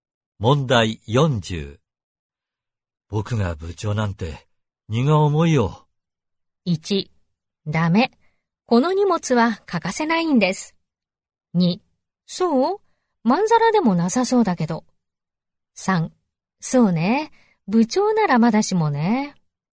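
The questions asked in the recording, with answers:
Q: 僕が部長なんて荷が重いよ。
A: 2: そう?まんざらでもなさそうだけど。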